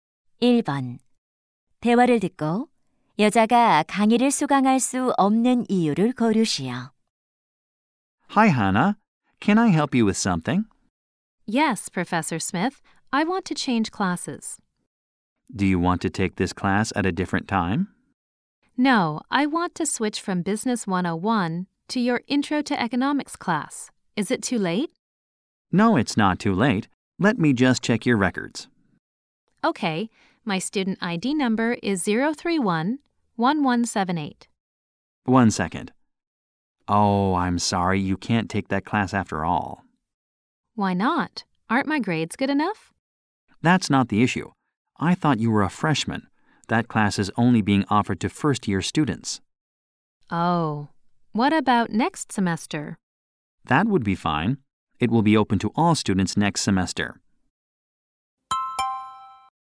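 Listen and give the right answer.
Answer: 신입생만 들을 수 있는 강의라서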